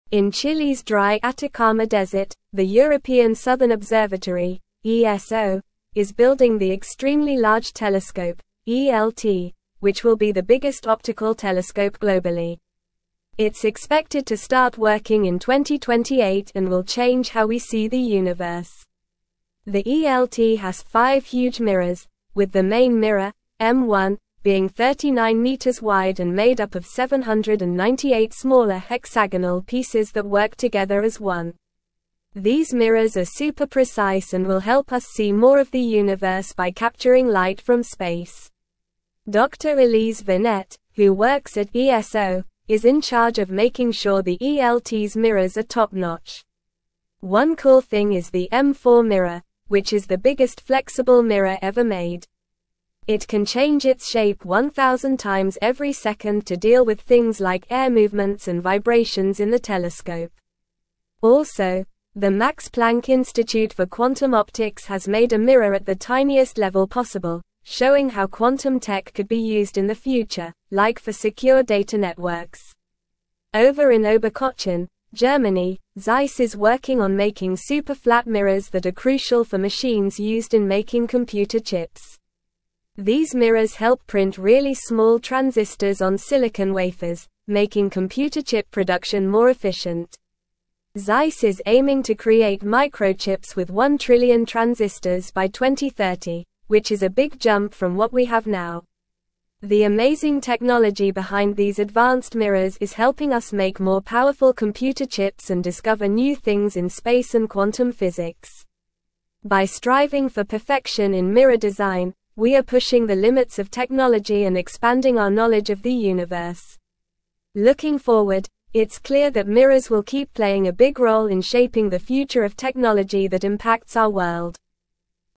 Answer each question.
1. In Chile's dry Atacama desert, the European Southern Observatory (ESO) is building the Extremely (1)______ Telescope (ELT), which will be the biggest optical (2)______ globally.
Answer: Large

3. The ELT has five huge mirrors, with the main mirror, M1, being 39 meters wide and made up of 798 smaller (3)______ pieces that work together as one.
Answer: hexagonal

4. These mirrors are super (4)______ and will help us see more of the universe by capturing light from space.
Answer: precise

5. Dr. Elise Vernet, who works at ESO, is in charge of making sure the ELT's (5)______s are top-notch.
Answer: mirror

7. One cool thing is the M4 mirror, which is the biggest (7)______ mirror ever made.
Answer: flexible

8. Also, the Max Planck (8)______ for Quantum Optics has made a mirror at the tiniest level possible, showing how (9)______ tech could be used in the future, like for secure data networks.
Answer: Institute

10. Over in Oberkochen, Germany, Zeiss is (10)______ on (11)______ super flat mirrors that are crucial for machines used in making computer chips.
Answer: working

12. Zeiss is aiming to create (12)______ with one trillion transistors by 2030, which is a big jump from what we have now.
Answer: microchips

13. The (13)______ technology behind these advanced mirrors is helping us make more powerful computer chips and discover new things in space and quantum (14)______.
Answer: amazing

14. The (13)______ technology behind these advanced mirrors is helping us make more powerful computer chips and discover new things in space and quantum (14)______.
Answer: physics

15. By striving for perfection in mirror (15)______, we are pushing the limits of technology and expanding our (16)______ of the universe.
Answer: design

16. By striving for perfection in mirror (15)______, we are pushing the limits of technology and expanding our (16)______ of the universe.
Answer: knowledge

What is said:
In Chile's dry Atacama desert, the European Southern Observatory (ESO) is building the Extremely Large Telescope (ELT), which will be the biggest optical telescope globally. It's expected to start working in 2028 and will change how we see the universe. The ELT has five huge mirrors, with the main mirror, M1, being 39 meters wide and made up of 798 smaller hexagonal pieces that work together as one. These mirrors are super precise and will help us see more of the universe by capturing light from space.
Dr. Elise Vernet, who works at ESO, is in charge of making sure the ELT's mirrors are top-notch. One cool thing is the M4 mirror, which is the biggest flexible mirror ever made. It can change its shape 1,000 times every second to deal with things like air movements and vibrations in the telescope. Also, the Max Planck Institute for Quantum Optics has made a mirror at the tiniest level possible, showing how quantum tech could be used in the future, like for secure data networks.
Over in Oberkochen, Germany, Zeiss is working on making super flat mirrors that are crucial for machines used in making computer chips. These mirrors help print really small transistors on silicon wafers, making computer chip production more efficient. Zeiss is aiming to create microchips with one trillion transistors by 2030, which is a big jump from what we have now.
The amazing technology behind these advanced mirrors is helping us make more powerful computer chips and discover new things in space and quantum physics. By striving for perfection in mirror design, we are pushing the limits of technology and expanding our knowledge of the universe. Looking forward, it's clear that mirrors will keep playing a big role in shaping the future of technology that impacts our world.

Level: Level 3